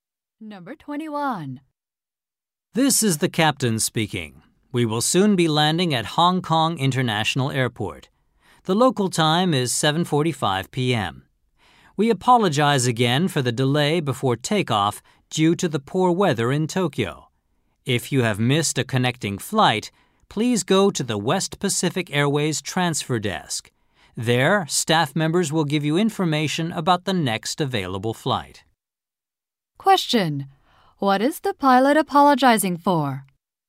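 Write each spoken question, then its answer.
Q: What is the pilot apologizing for?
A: The delay before takeoff due to poor weather.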